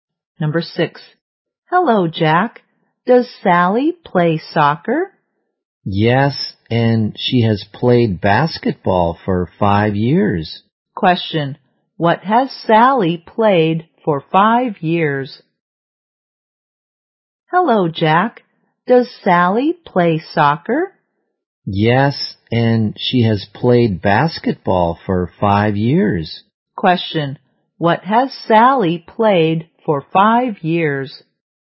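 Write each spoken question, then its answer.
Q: Question, what has Sally played for 5 years?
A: Basketball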